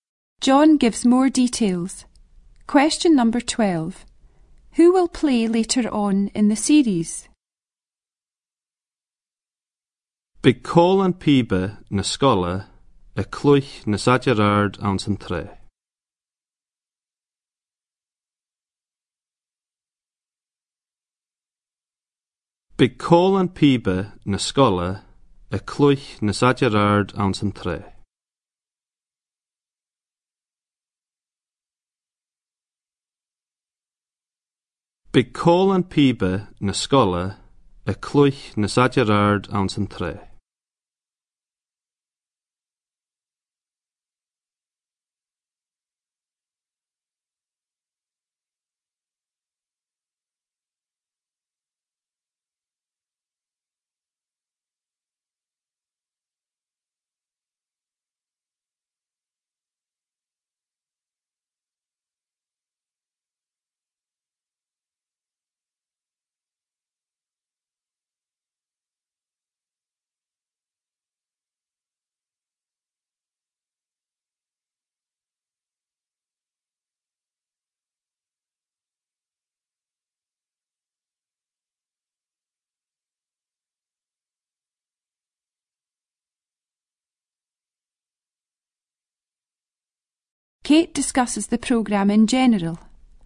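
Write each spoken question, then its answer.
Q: Who will play later on in the series?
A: The school pipe band, in the third programme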